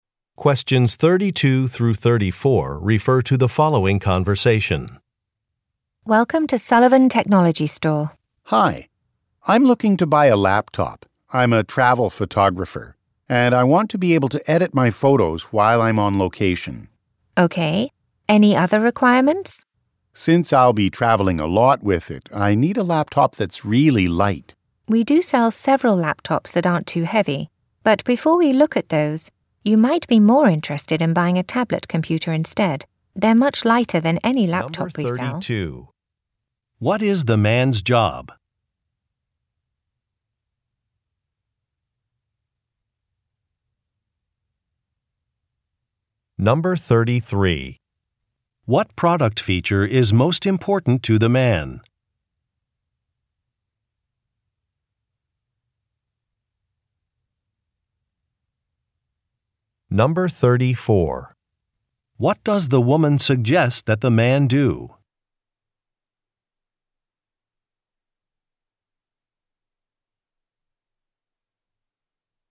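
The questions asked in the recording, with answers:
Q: What is the man's job?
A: A travel photographer

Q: What product feature is most important to the man?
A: Being lightweight

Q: What does the woman suggest that the man do?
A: Buy a tablet computer instead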